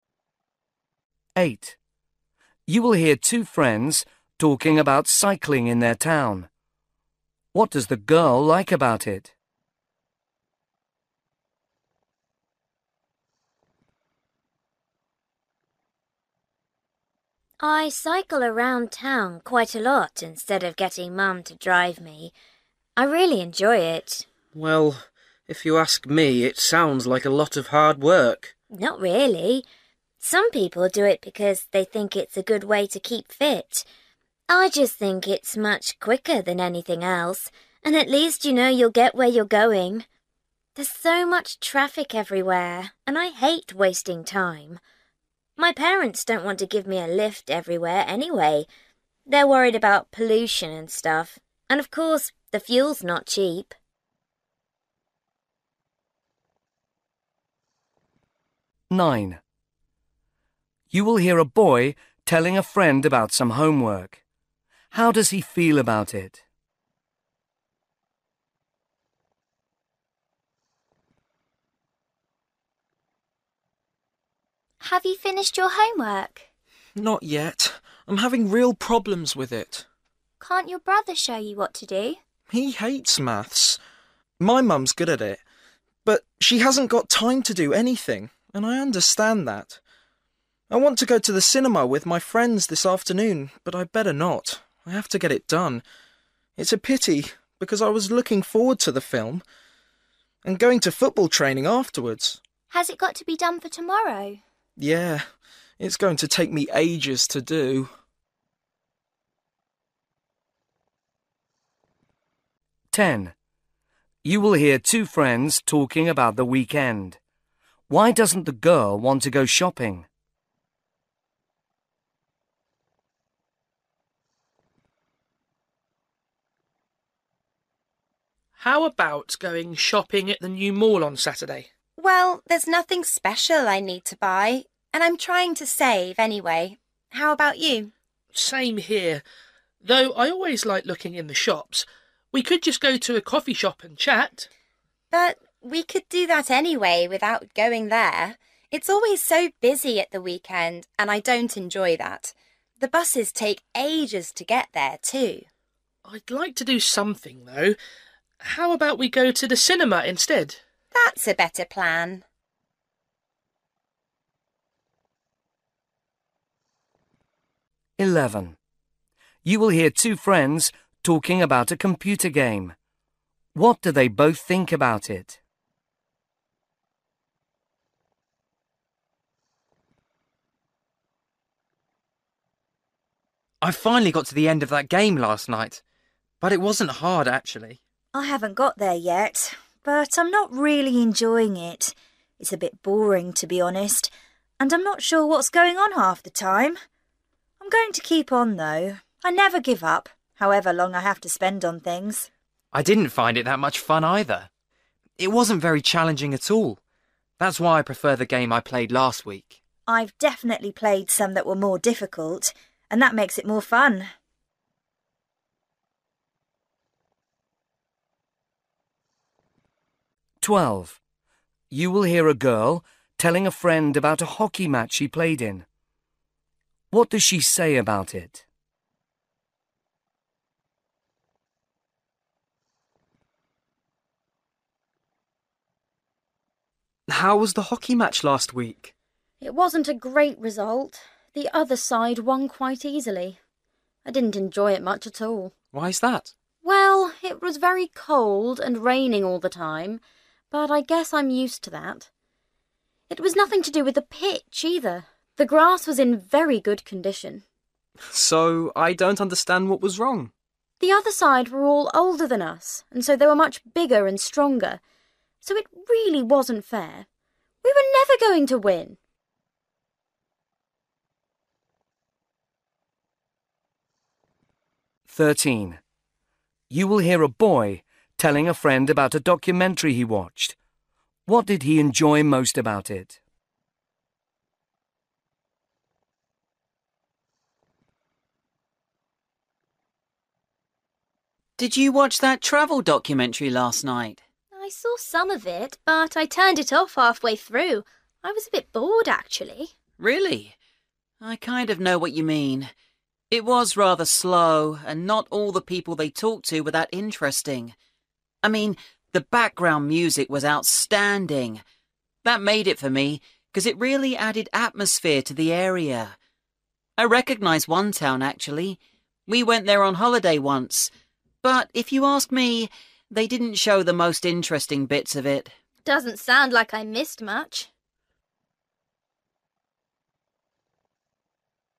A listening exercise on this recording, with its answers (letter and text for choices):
For each question, choose the correct answer.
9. How does he feel about it?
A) sure that he won't finish on time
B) sorry that he can't do other things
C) annoyed because he can't get any help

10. Why doesn't the girl want to go shopping?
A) She doesn't have enough money.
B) The centre will be too crowded.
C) It will waste too much time.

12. What does she say about it?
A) It was spoiled by the weather.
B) The two teams weren't at the same level.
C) There were problems with the playing area.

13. What did he enjoy most about it?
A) the soundtrack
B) the interviews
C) the location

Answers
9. B) sorry that he can't do other things
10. B) The centre will be too crowded.
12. B) The two teams weren't at the same level.
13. A) the soundtrack

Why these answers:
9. 'It's a pity because I was looking forward to the film, and going to football training afterwards.'
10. '... it's always so busy at the weekend, and I don't enjoy that.'
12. 'The other side were all older than us and so they were much bigger and stronger – so it really wasn't fair.'
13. 'I mean, the background music was outstanding – that made it for me 'cos it really added atmosphere.'

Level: B1